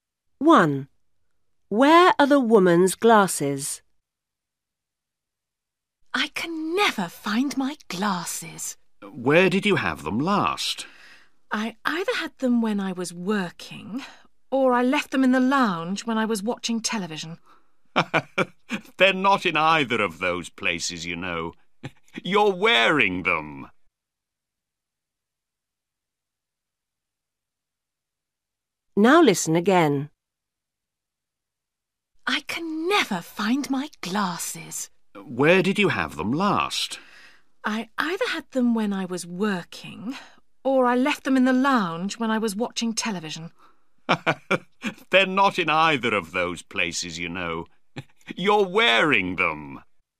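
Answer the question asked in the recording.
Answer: She's wearing them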